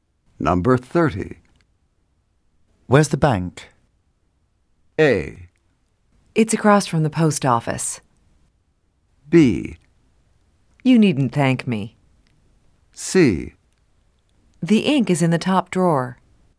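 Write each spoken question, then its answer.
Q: Where's the bank?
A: A: It's across from the post office.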